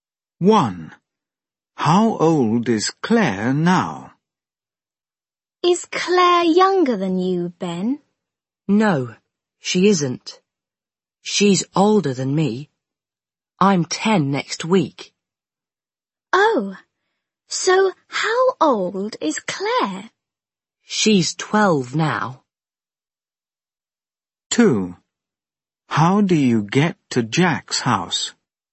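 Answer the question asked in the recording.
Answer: 12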